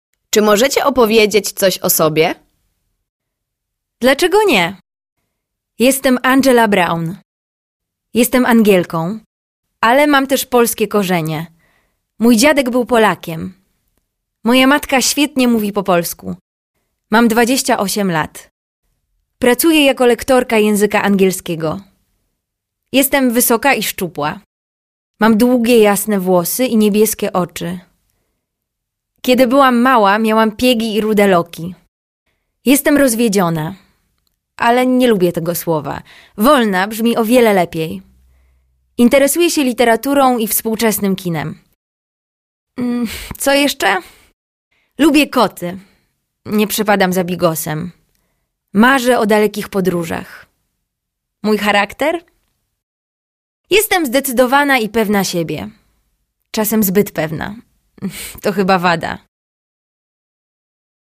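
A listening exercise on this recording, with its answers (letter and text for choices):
Proszę wybrać właściwą formę.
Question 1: jestem Angielką | Angielka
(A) Angielką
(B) Angielka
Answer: (A) Angielką

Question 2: Mam 28 lata | lat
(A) lata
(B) lat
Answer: (B) lat

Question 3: Jestem wysoka i szczupła | szczupłą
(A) szczupła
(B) szczupłą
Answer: (A) szczupła

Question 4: miałam piegi ani | i rude loki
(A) ani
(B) i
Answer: (B) i

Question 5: Interesuję się literaturę | literaturą i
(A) literaturę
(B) literaturą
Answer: (B) literaturą

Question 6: Lubię kot | koty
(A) kot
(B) koty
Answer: (B) koty

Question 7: nie przepadam za bigos | bigosem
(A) bigos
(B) bigosem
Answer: (B) bigosem

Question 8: Jestem zdecydowana i pewna siebie | się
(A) siebie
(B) się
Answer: (A) siebie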